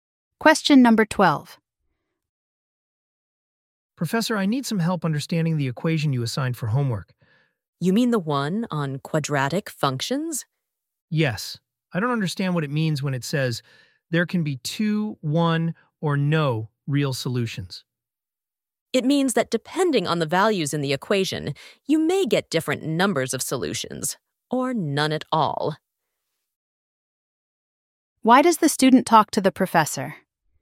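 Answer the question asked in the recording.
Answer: To get help understanding a homework equation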